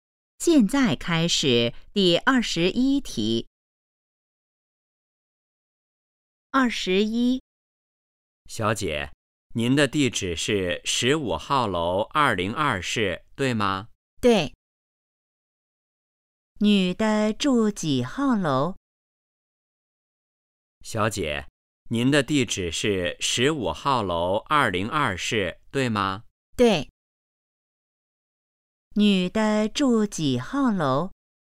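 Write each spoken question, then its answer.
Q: 女的住几号楼?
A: 十五号楼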